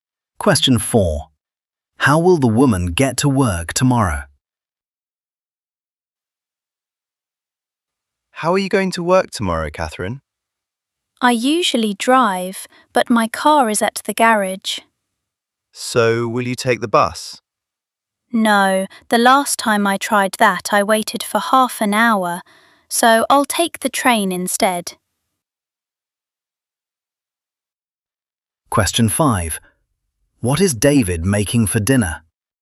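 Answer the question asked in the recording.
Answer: By train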